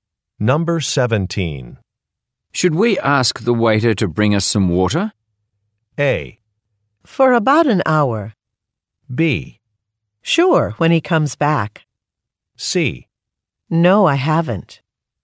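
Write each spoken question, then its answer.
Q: Should we ask the waiter to bring us some water?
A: B: Sure, when he comes back.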